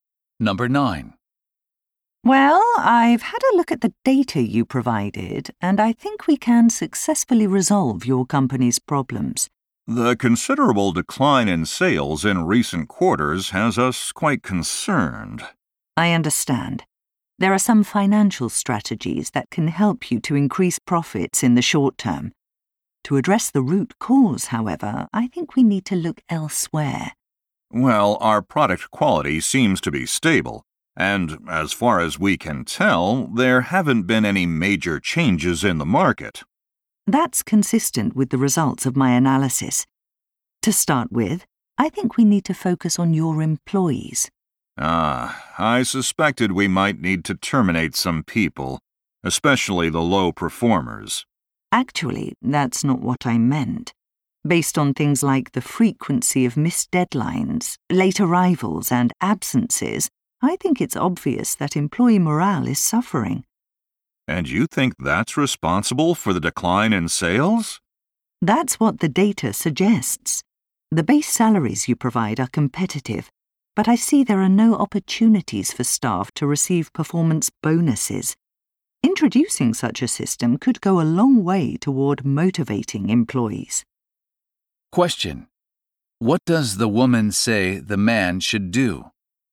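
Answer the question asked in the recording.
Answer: Give employees a chance to earn performance bonuses.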